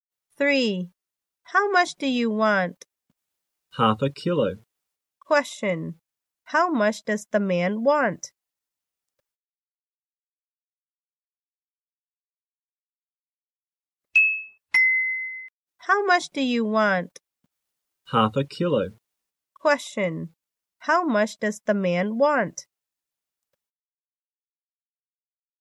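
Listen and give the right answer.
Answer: Half a kilo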